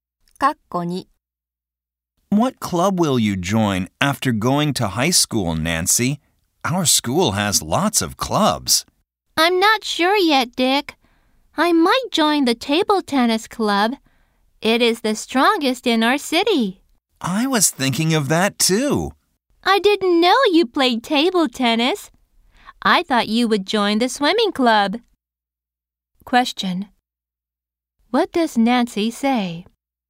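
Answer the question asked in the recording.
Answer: She might join the table tennis club.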